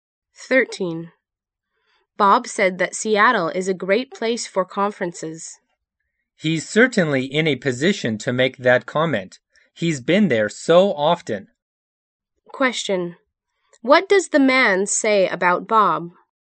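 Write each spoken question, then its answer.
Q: What does the man say about Bob?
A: Bob has been to Seattle many times, so he knows it well.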